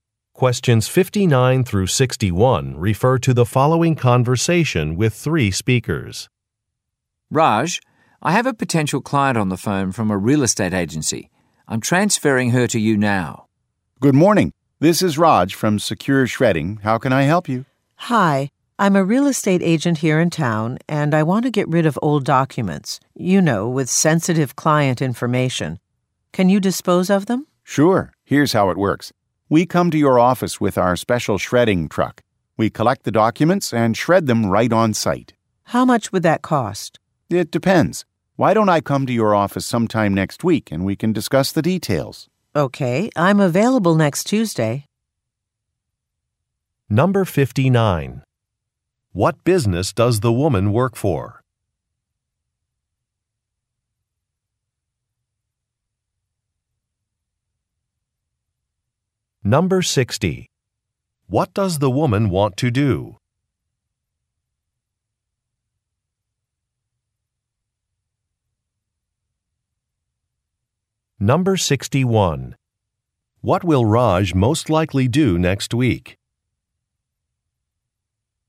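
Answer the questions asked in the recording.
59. A real estate agency
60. Dispose of old documents
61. Visit the woman's office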